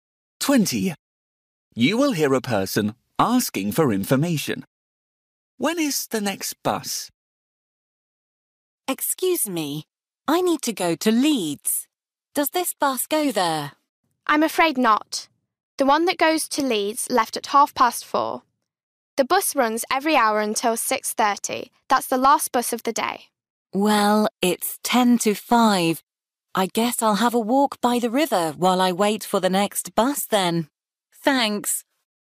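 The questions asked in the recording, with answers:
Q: When is the next bus?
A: 5:30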